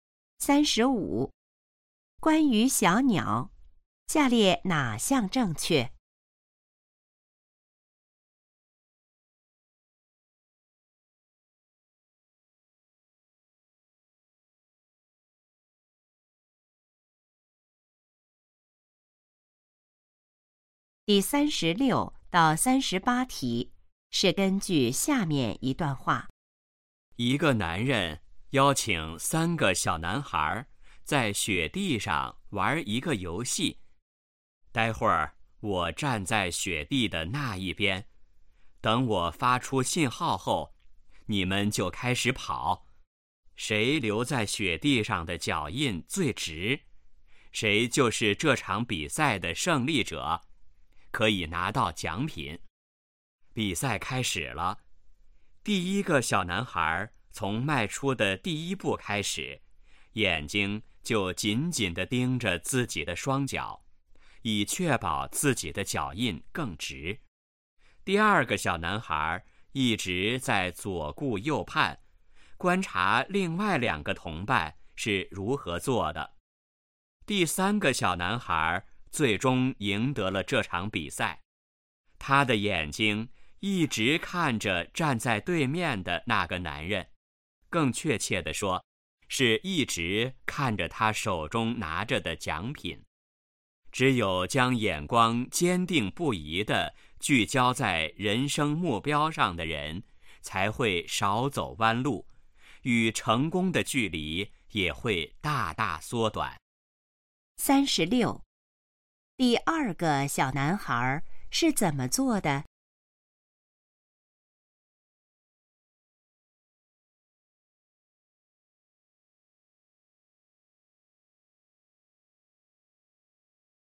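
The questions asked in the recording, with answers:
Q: 第二个小男孩是怎么做的?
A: 左顾右盼,观察另外两个同伴

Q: 谁得到了奖品?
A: 第三个小男孩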